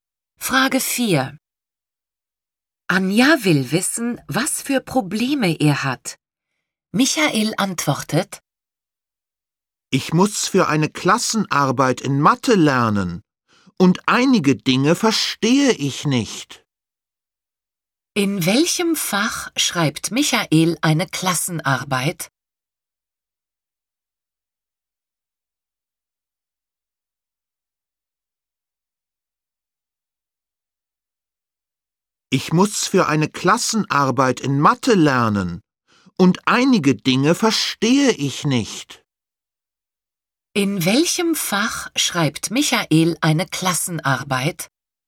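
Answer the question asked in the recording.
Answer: Mathe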